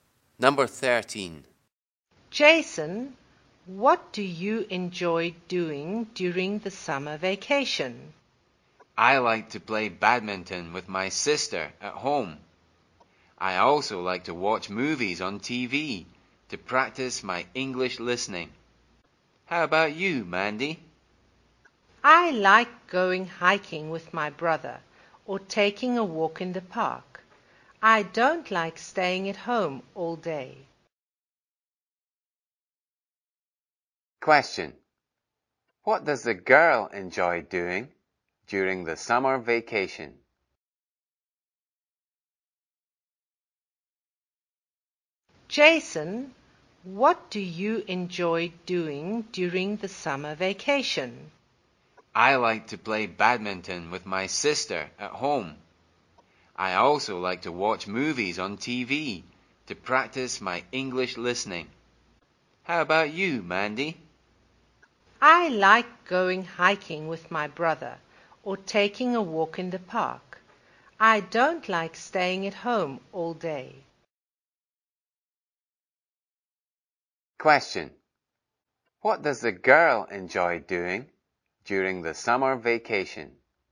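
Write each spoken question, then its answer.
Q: What does the girl enjoy doing during the summer vacation?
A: Going hiking with her brother or taking a walk in the park.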